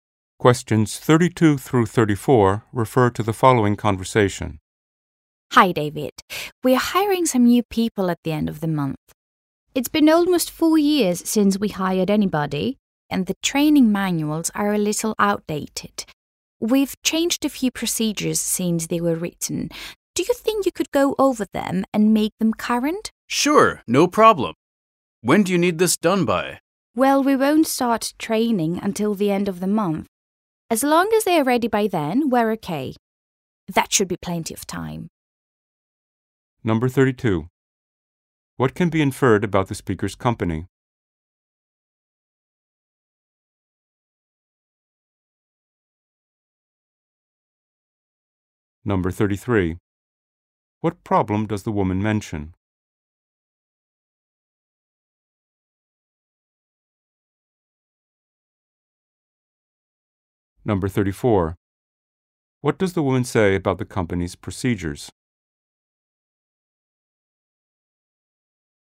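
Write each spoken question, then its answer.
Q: What problem does the woman mention?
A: The training manuals are outdated.

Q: What does the woman say about the company's procedures?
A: Some procedures have changed since the manuals were written.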